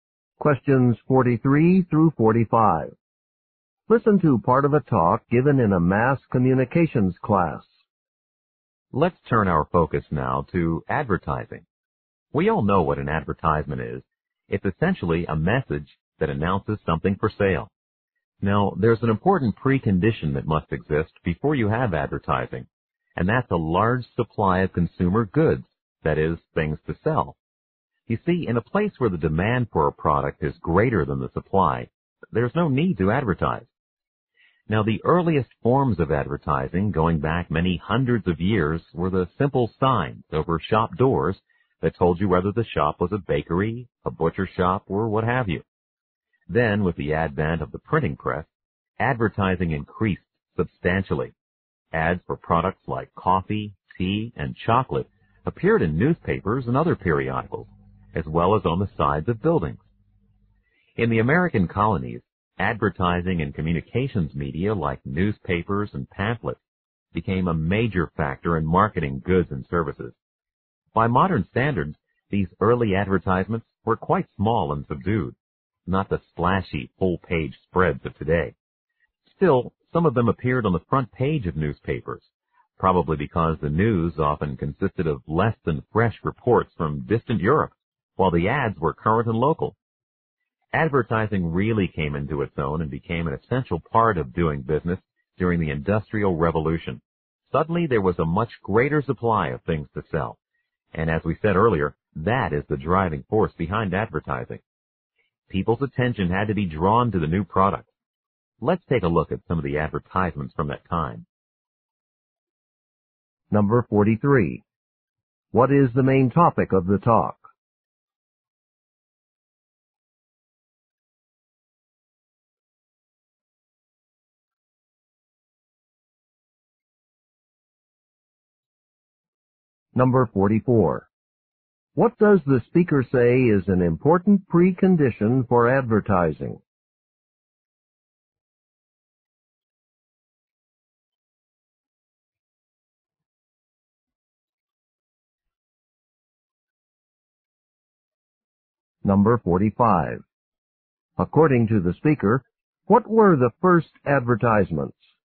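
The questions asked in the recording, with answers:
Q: What is the main topic of the talk?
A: The history of advertising

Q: What does the speaker say is an important precondition for advertising?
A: A large supply of consumer goods

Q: According to the speaker, what were the first advertisements?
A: Simple signs over shop doors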